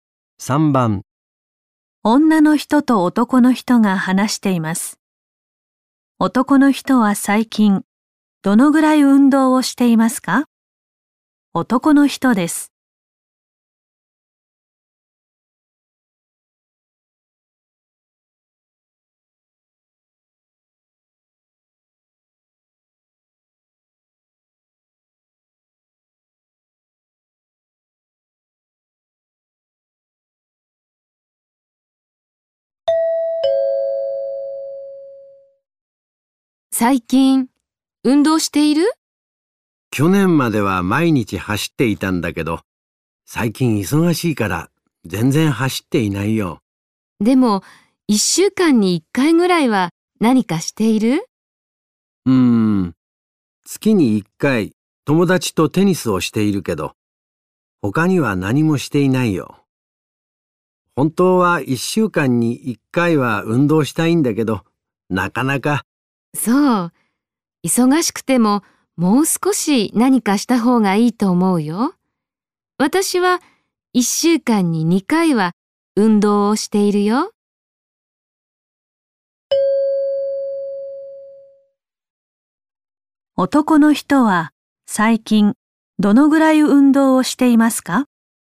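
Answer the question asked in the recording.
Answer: 月に1回(テニス)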